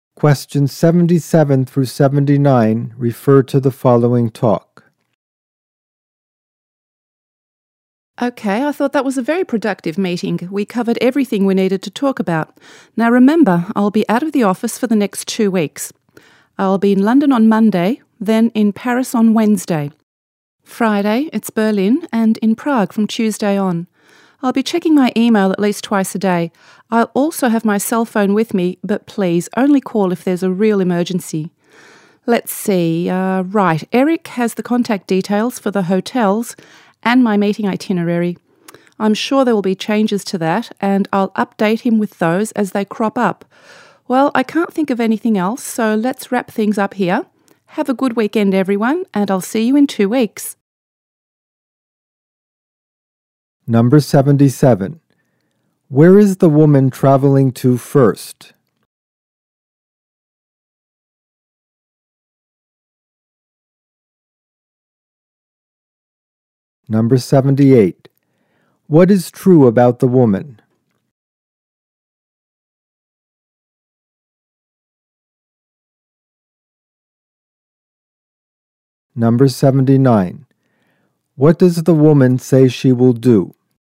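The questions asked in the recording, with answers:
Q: Where is the woman traveling to first?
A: London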